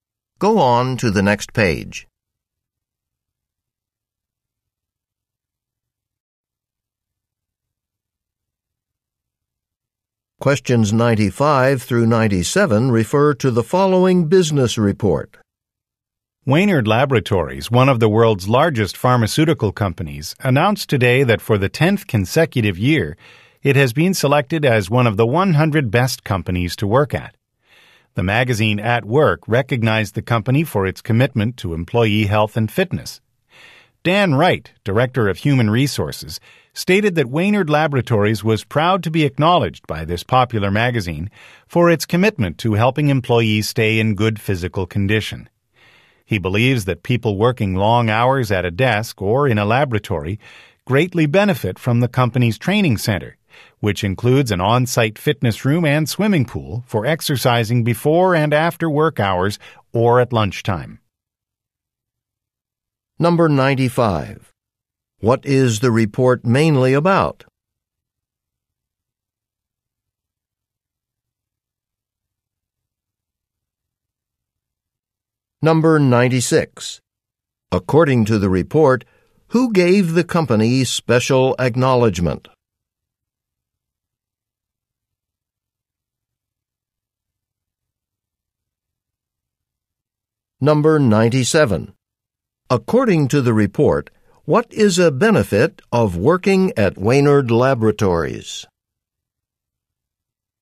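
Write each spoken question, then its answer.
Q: What is the report mainly about?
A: A company chosen as one of the best places to work

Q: According to the report, who gave the company special acknowledgement?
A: The magazine At Work

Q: According to the report, what is a benefit of working at Wainard Laboratories?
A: An on-site fitness room and swimming pool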